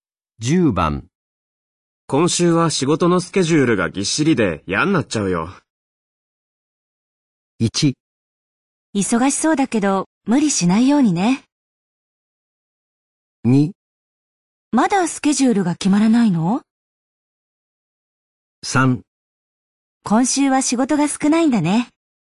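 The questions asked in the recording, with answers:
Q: 今週は仕事のスケジュールがぎっしりで嫌になっちゃうよ。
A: 1: 忙しそうだけど無理しないようにね。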